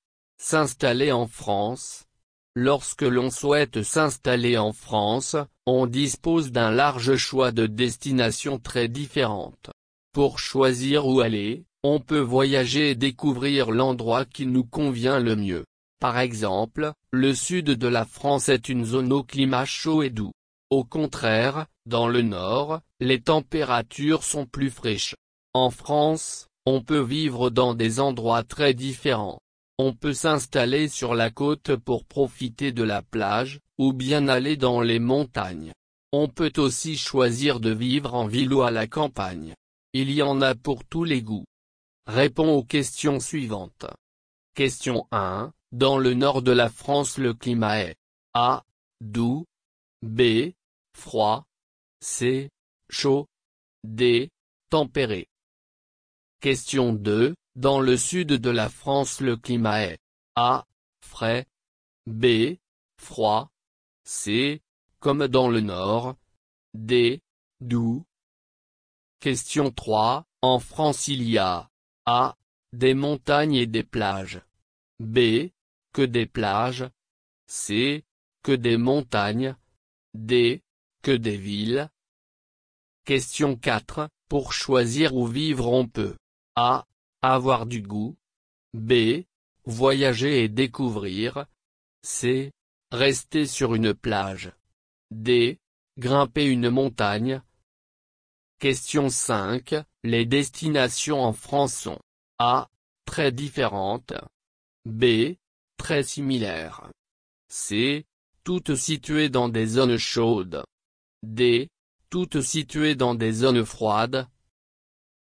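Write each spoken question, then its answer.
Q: Dans le sud de la France, le climat est A.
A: D: Doux

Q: En France, il y a A.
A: A: Des montagnes et des plages

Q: Pour choisir où vivre, on peut A.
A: B: Voyager et découvrir

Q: Les destinations en France sont A.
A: A: Très différentes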